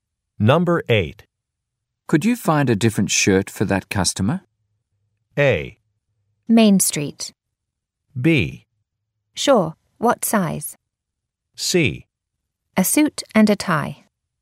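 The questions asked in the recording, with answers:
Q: Could you find a different shirt for that customer?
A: B: Sure. What size?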